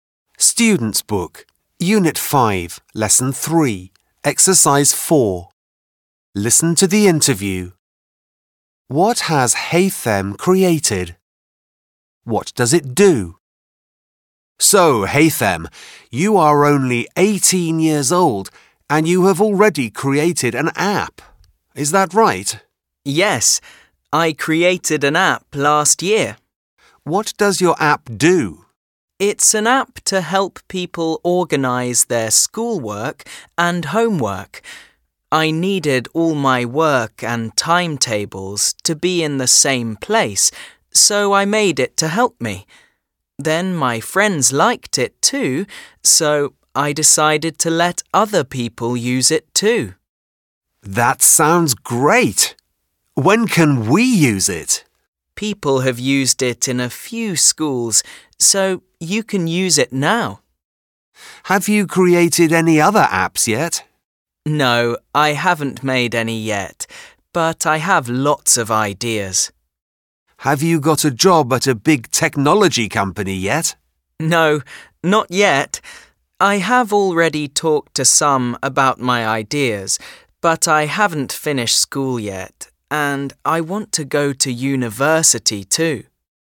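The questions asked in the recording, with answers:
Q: What has Haytham created?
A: An app

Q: What does it do?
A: It helps people organise their schoolwork and homework.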